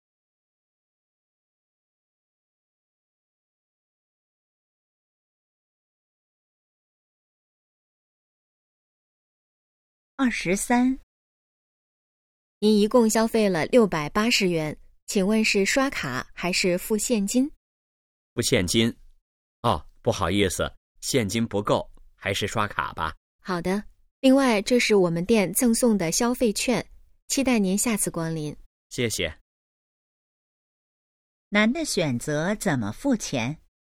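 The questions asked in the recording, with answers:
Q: 男的选择怎么付钱?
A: 刷卡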